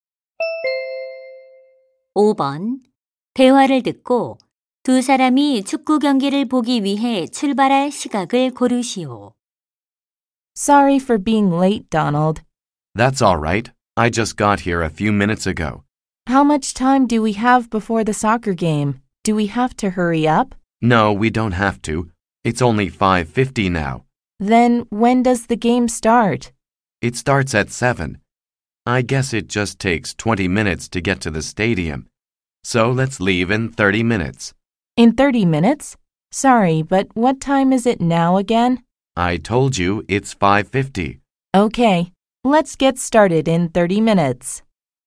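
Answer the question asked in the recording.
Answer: 6시 20분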